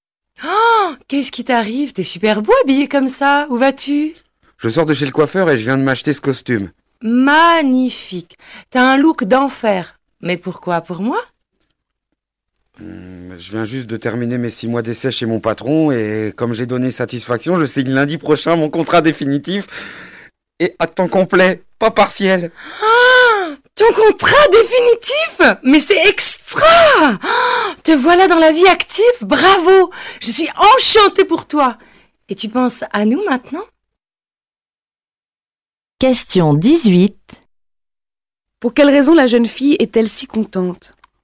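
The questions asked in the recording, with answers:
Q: Pour quelle raison la jeune fille est-elle si contente?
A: Son ami va signer un contrat définitif à temps complet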